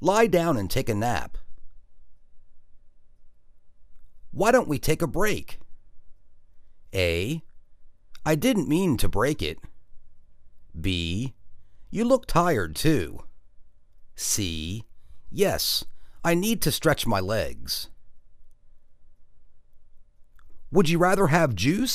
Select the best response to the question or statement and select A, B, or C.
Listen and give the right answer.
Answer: Yes, I need to stretch my legs.